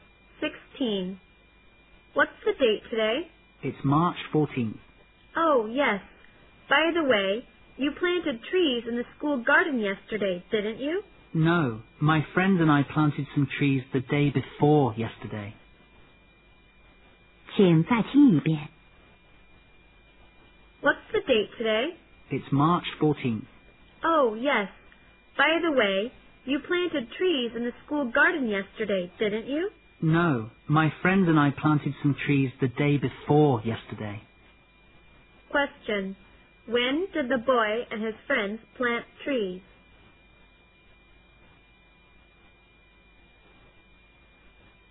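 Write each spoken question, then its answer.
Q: When did the boy and his friends plant trees?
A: On March 12th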